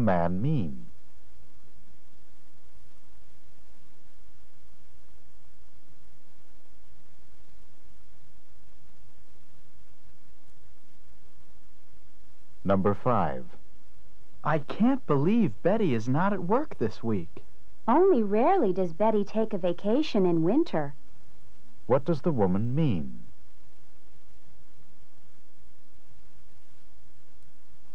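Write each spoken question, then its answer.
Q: What does the woman mean?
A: Betty doesn't usually take a vacation in winter.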